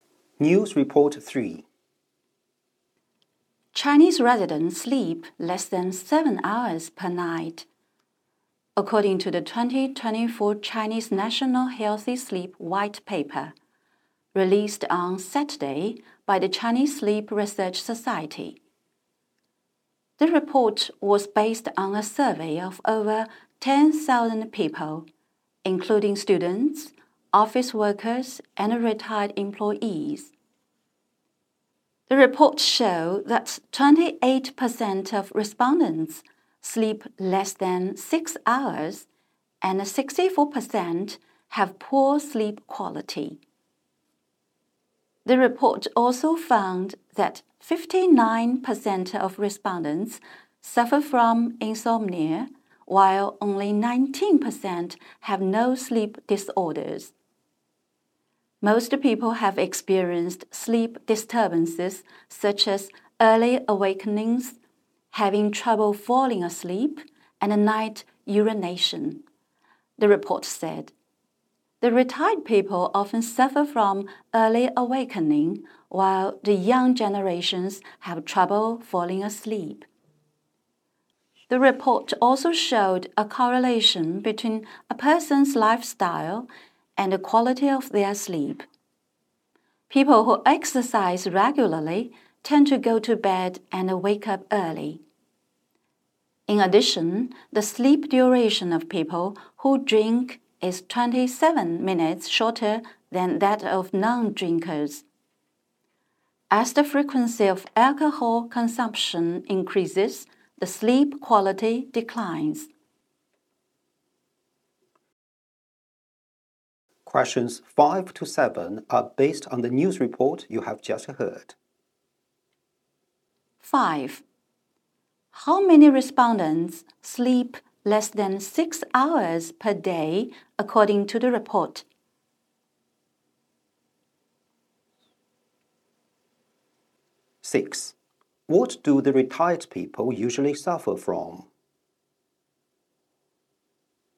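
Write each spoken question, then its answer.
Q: How many respondents sleep less than 6 hours per day, according to the report?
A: 28%

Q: What do the retired people usually suffer from?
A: Early awakening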